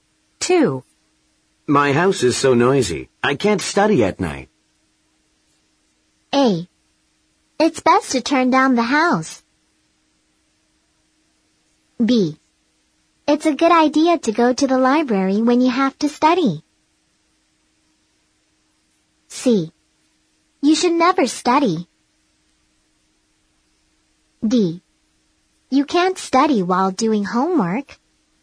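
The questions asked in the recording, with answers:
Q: My house is so noisy. I can't study at night.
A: B: It's a good idea to go to the library when you have to study.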